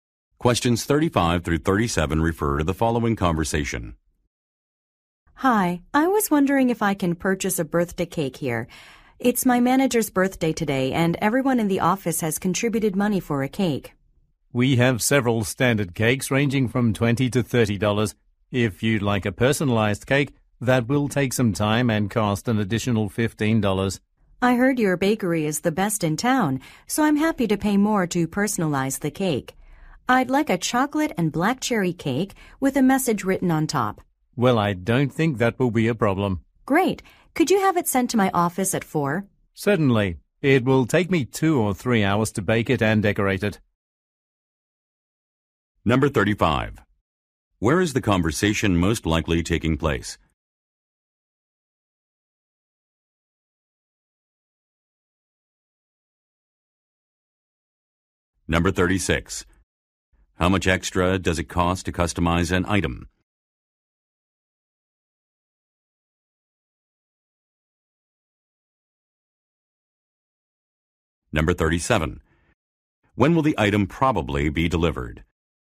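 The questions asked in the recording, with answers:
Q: Where is the conversation most likely taking place?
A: At a bakery

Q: How much extra does it cost to customize an item?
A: $15

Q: When will the item probably be delivered?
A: At 4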